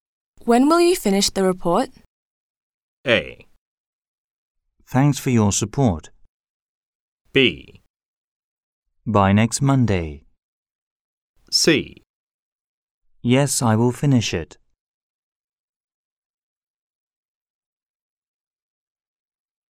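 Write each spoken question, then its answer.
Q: When will you finish the report?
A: B: By next Monday.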